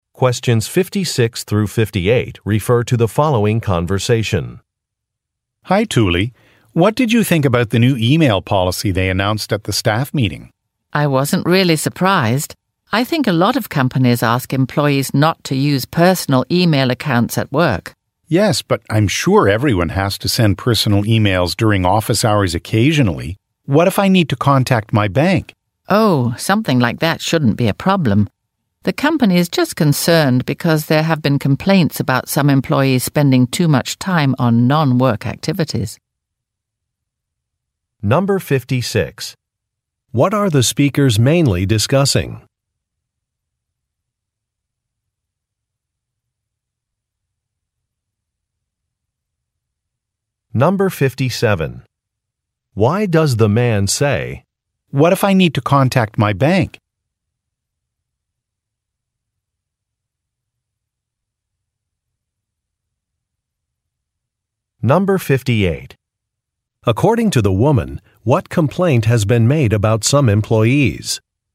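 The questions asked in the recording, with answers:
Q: What are the speakers mainly discussing?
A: The company's new email policy

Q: According to the woman, what complaint has been made about some employees?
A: They spend too much time on non-work activities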